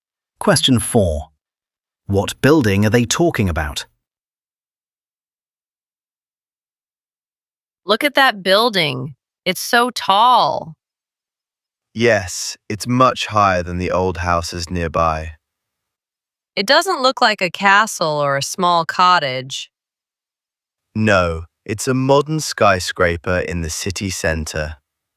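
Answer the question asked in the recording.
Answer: a skyscraper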